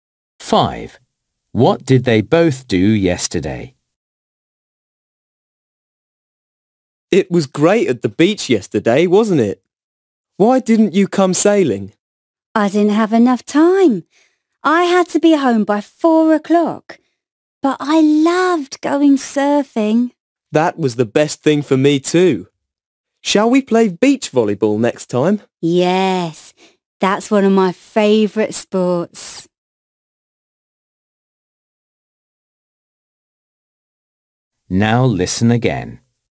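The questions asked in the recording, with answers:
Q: What did they both do yesterday?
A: They went surfing.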